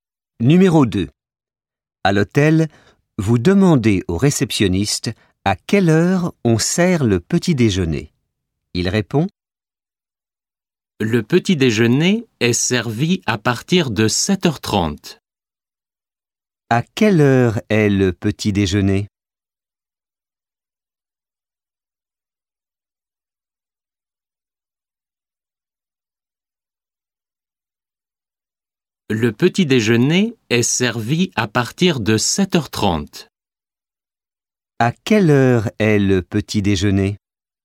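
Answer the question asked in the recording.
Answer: À partir de 7h30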